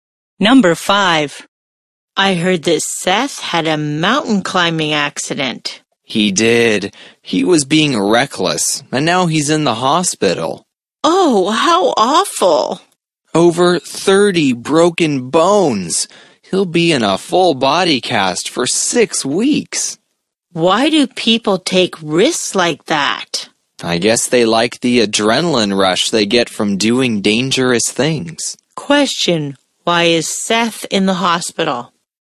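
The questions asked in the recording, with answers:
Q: Why is Seth in the hospital?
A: He had a mountain climbing accident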